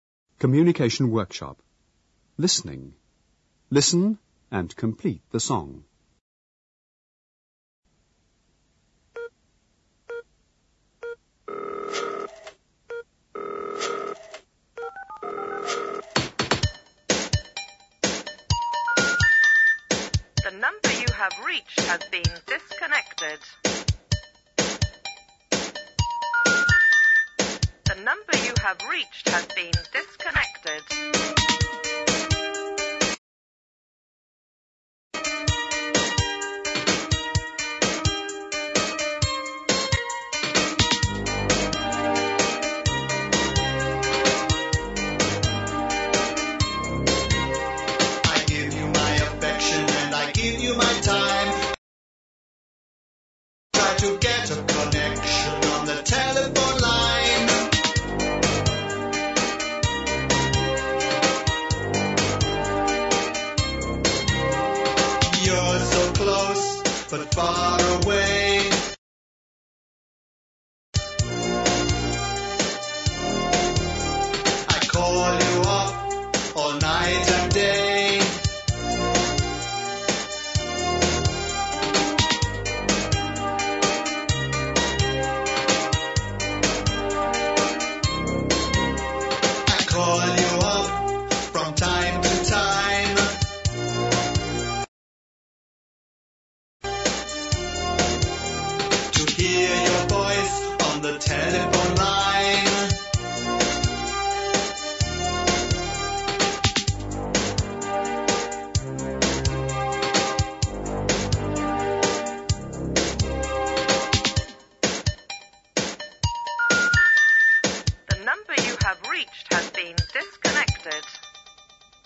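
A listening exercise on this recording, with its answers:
Listen and complete the song.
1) The____you have reached has been disconnected.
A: number

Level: 高中英语必修模块2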